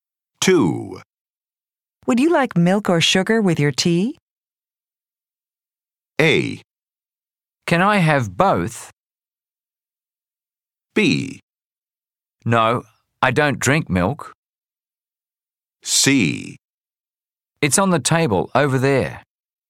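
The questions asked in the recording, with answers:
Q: Would you like milk or sugar with your tea?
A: A: Can I have both?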